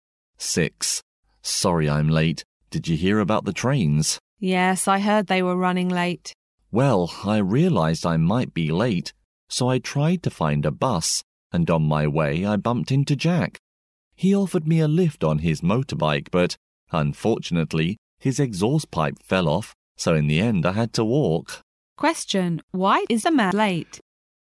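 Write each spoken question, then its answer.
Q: Why is a man late?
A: Jack's motorbike broke down, so he had to walk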